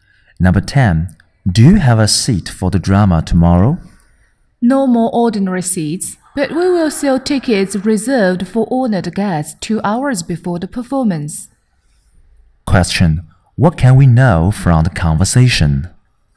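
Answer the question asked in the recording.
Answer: Only tickets reserved for honored guests are left, sold 2 hours before the performance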